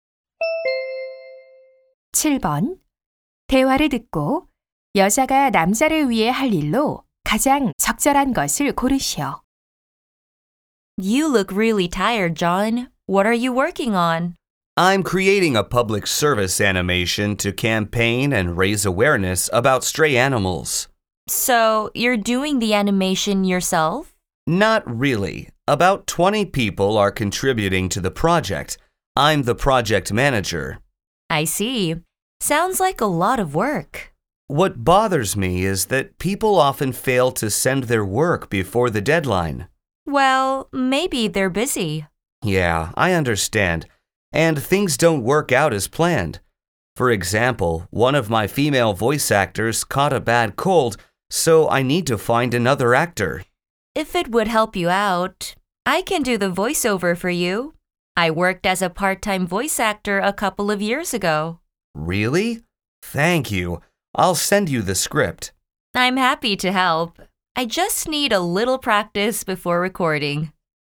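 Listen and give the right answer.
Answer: 애니메이션 목소리 녹음하기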